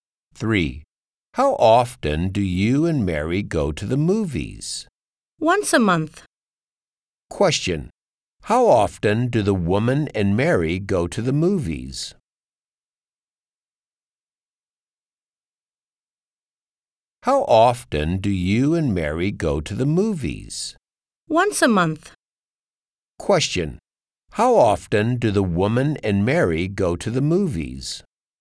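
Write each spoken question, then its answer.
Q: How often do the woman and Mary go to the movies?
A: Once a month.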